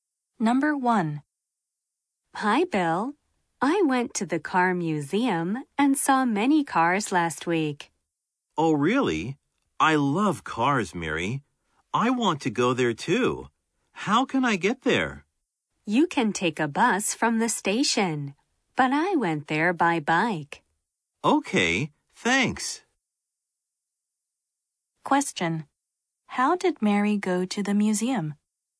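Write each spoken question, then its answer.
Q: How did Mary go to the museum?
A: By bike.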